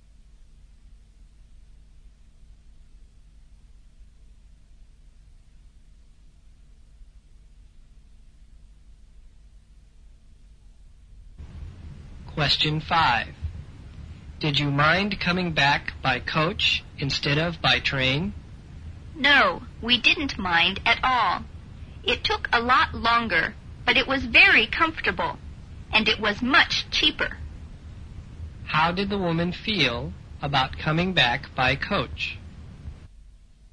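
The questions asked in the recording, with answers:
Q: How did the woman feel about coming back by coach?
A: She didn't mind; it was comfortable and cheaper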